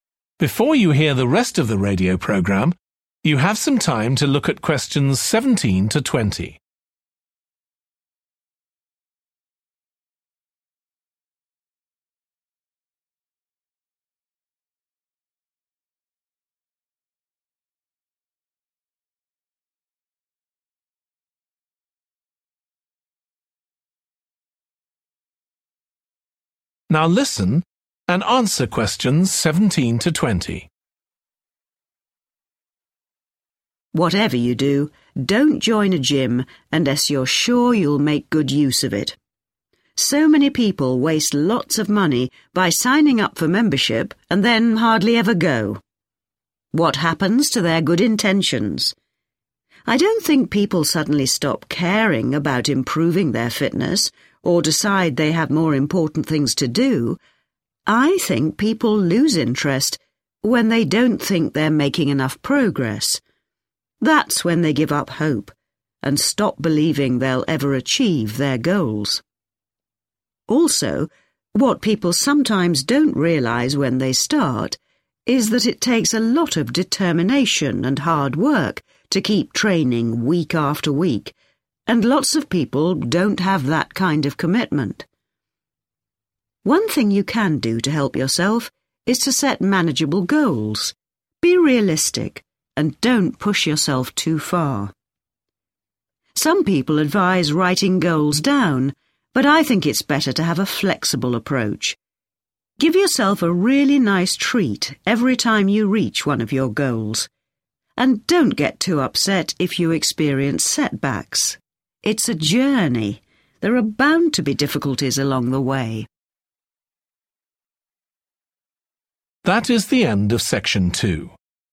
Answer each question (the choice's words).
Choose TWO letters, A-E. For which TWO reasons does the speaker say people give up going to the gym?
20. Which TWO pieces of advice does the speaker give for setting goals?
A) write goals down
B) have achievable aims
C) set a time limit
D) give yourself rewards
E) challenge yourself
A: give yourself rewards

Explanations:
Give yourself a really nice treat every time you reach one of your goals (=> D) [Tự thưởng cho bản thân mỗi khi bạn đạt được một trong những mục tiêu của mình]